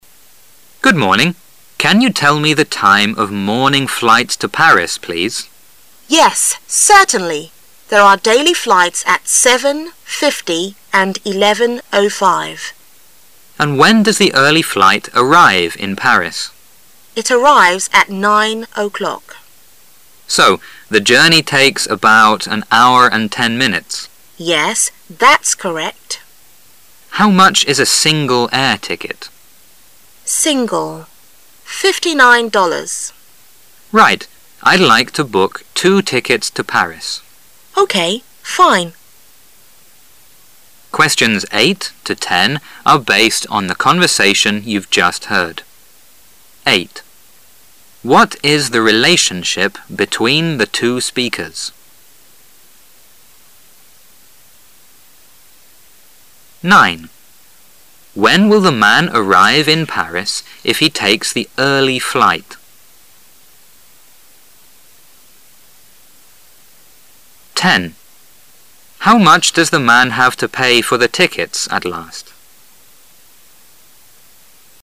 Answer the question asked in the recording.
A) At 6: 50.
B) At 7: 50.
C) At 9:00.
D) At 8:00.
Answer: C) At 9:00.

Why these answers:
When will the man arrive in Paris if hc takes the early flight?